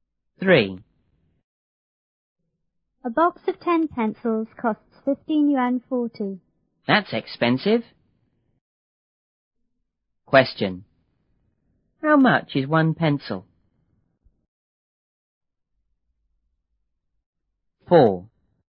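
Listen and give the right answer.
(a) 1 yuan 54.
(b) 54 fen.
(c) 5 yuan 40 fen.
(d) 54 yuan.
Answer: (a) 1 yuan 54.

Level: 初中英语广州版1B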